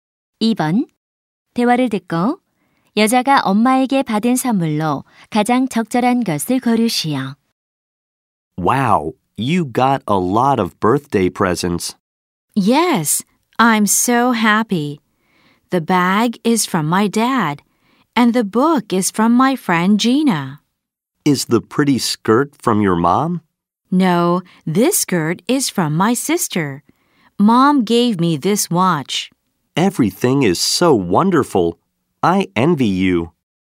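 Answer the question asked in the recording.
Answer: 시계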